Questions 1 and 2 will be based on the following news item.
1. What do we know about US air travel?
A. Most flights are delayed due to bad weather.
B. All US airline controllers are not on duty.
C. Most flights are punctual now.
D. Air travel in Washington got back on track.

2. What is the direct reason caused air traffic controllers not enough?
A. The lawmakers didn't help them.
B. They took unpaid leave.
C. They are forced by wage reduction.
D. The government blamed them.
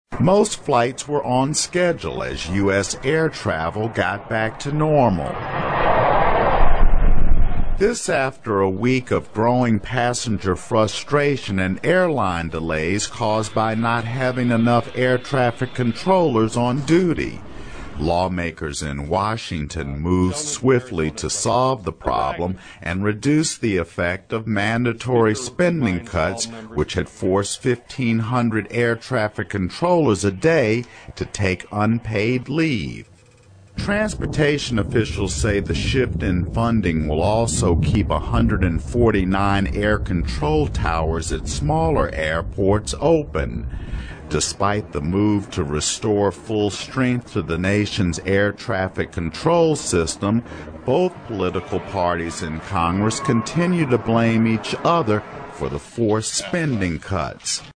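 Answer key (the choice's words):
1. Most flights are punctual now.
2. They took unpaid leave.

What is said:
Most flights were on schedule, as US air travel got back to normal. This came after a week of growing passenger frustration and airline delays caused by not having enough air traffic controllers on duty. Lawmakers in Washington moved swiftly to solve the problem - and reduce the effect of mandatory spending cuts which had forced 15-hundred air traffic controllers a day to take unpaid leave.
Transportation officials say the shift in funding also will keep 149 air-control towers at smaller airports open. Despite the move restoring full strength to the nation's air traffic control system, both political parties in Congress continue to blame each other for the forced spending cuts.

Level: 英语四级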